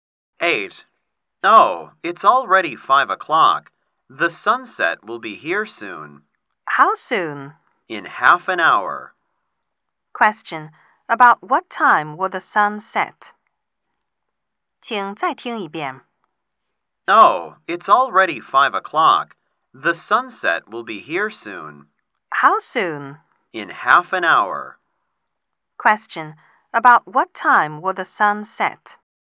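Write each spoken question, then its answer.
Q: Question. About what time will the sun set?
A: About 5:30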